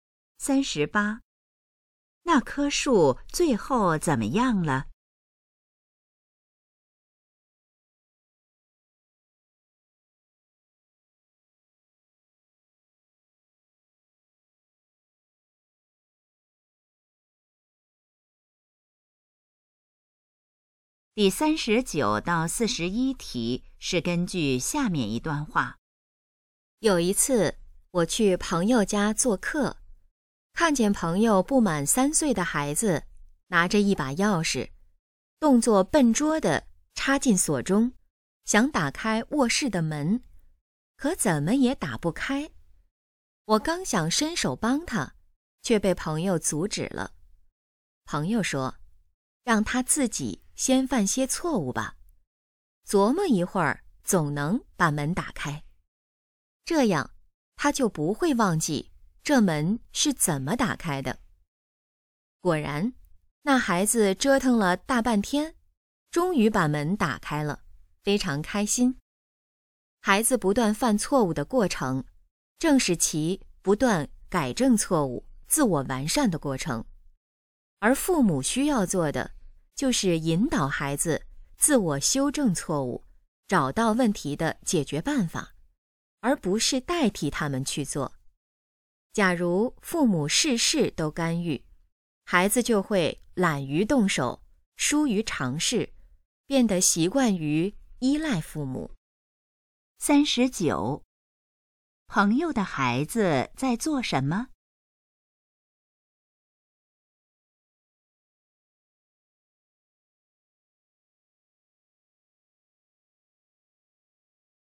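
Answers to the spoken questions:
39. 用钥匙开卧室的门
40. 想让孩子自己犯错、琢磨着把门打开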